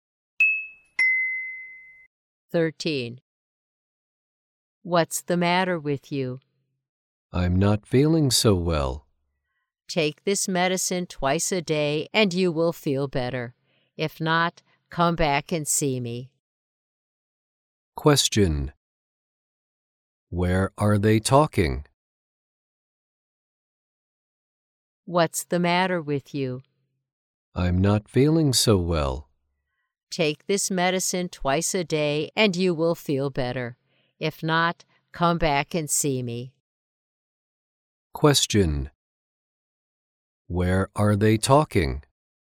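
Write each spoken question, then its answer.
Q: Where are they talking?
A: In a hospital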